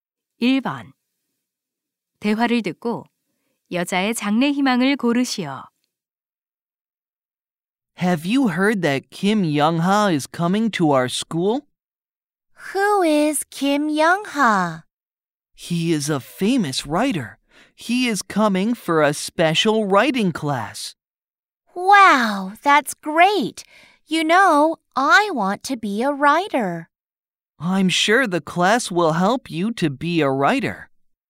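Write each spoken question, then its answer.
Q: 대화를 듣고 여자의 장래 희망을 고르시오.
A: 작가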